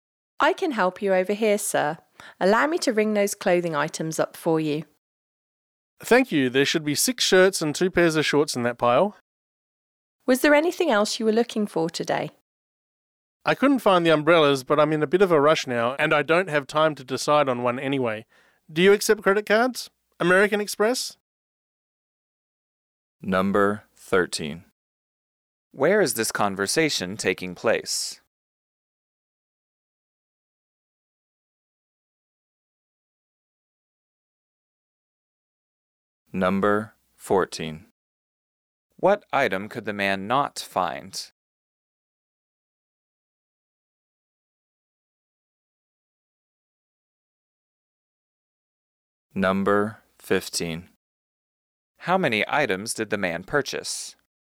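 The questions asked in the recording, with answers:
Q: Where is this conversation taking place?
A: In a clothing store

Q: What item could the man not find?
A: Umbrellas

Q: How many items did the man purchase?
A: 8 (6 shirts and 2 pairs of shorts)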